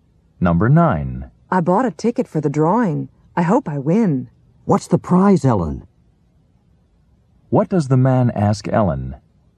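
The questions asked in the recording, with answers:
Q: What does the man ask Ellen?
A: What the prize is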